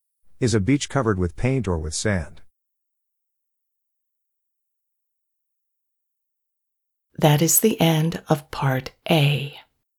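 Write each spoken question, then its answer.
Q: Is a beach covered with paint or with sand?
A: Sand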